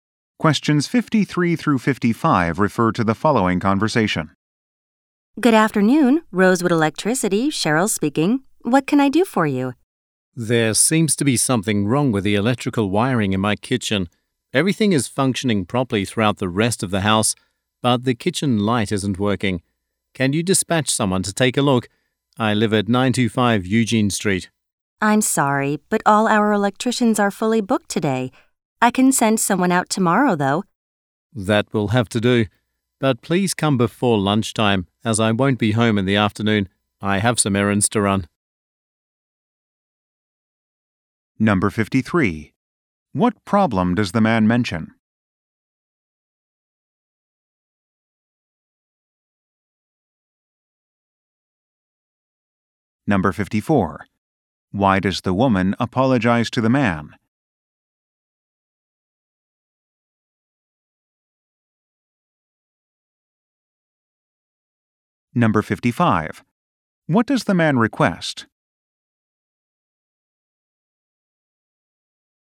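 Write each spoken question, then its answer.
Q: What problem does the man mention?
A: The kitchen light isn't working

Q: Why does the woman apologize to the man?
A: All electricians are fully booked today

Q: What does the man request?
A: That someone come before lunchtime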